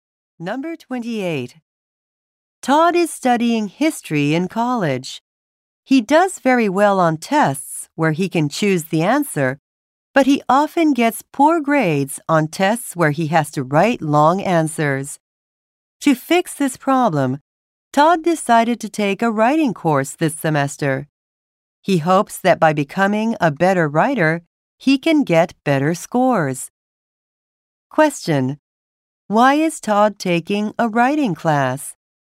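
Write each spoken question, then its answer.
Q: Why is Todd taking a writing class?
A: To get better scores on tests with long written answers.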